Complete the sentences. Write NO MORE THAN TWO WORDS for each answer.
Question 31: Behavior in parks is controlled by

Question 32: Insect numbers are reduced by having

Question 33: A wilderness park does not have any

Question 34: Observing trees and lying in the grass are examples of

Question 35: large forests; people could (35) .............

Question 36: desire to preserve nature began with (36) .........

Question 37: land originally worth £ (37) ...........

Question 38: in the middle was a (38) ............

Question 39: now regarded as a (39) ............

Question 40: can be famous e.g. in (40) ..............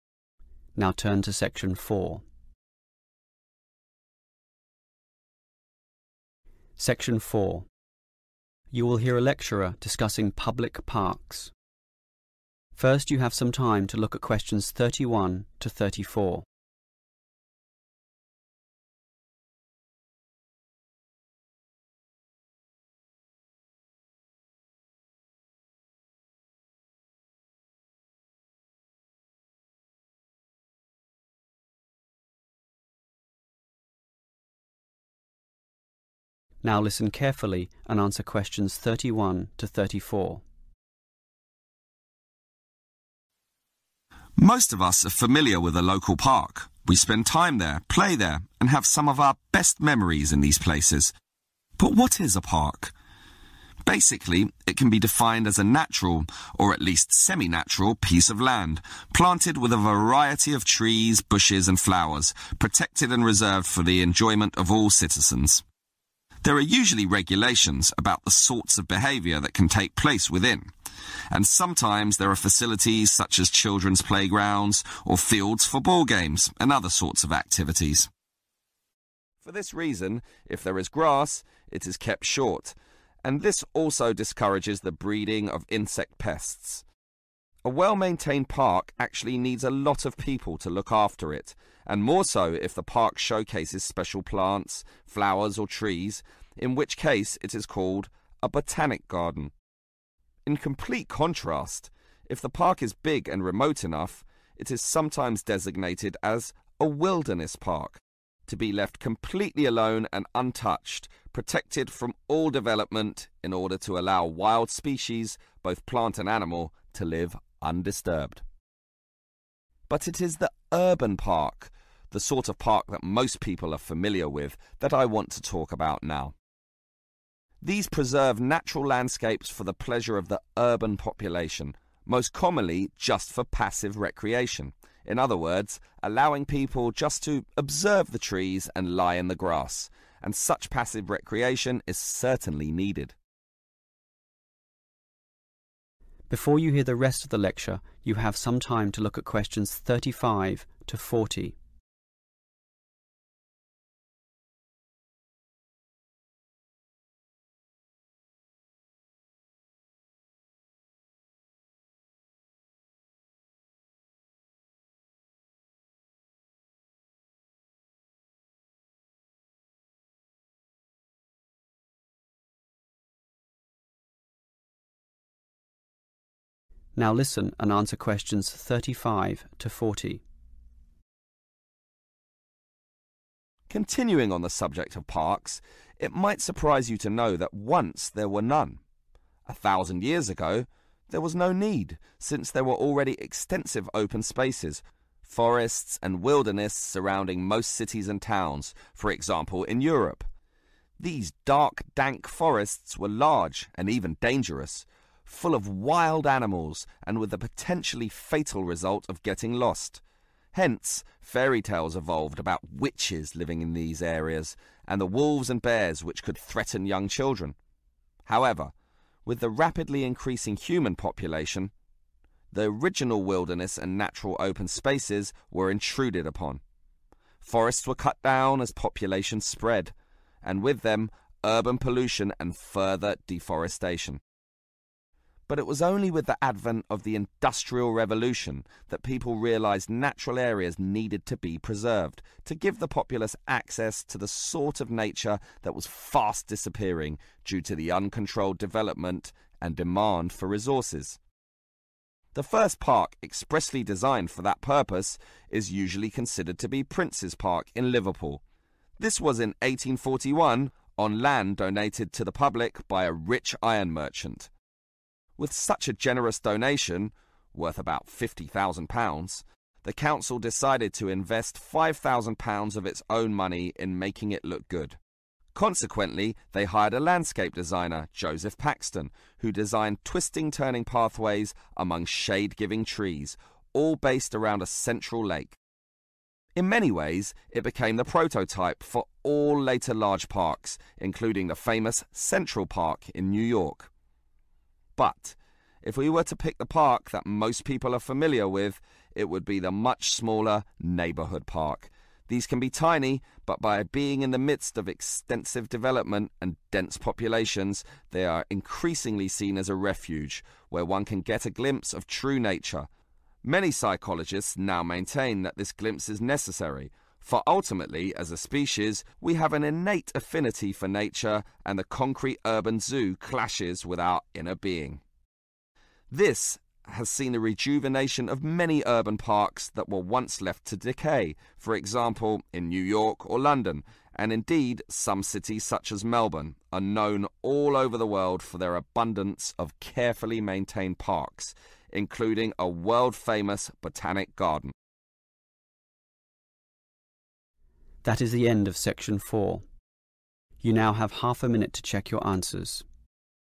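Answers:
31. regulations
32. short grass
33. development
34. passive recreation
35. get lost
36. Industrial Revolution
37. 50,000
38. lake
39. refuge
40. Melbourne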